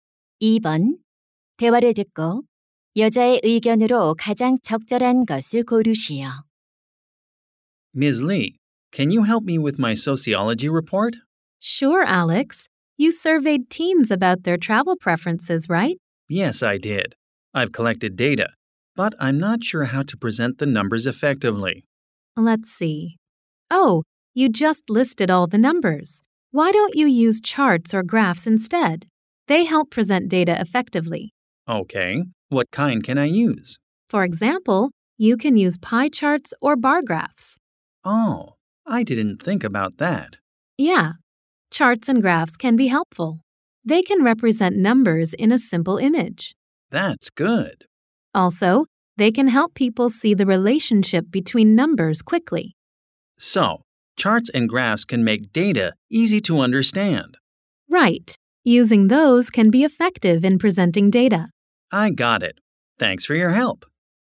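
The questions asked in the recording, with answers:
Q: 대화를 듣고 여자의 의견으로 가장 적절한 것을 고르시오.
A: 차트와 그래프를 사용하면 데이터를 효과적으로 제시할 수 있다.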